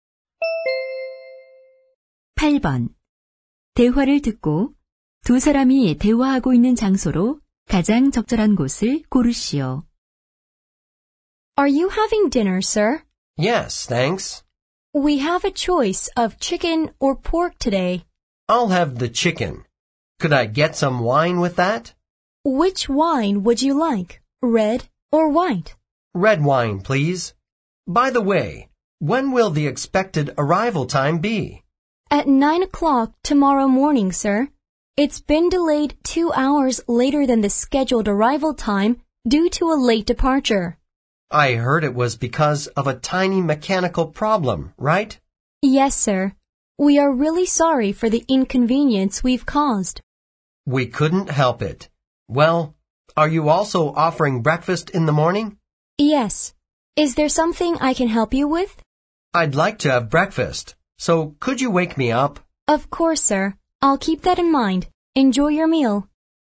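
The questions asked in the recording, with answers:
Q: 대화를 듣고 두 사람이 대화하고 있는 장소로 가장 적절한 곳을 고르시오.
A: 비행기 안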